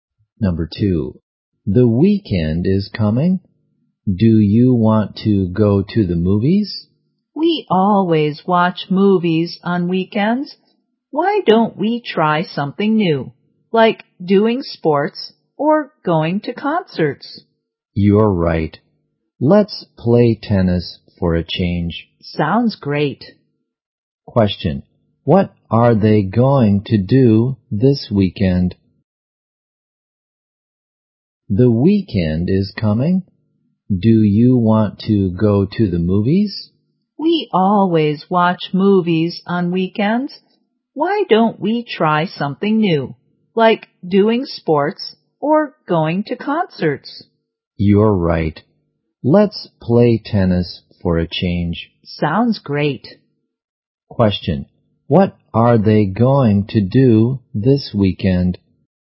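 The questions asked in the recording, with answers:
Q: What are they going to do this weekend?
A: Play tennis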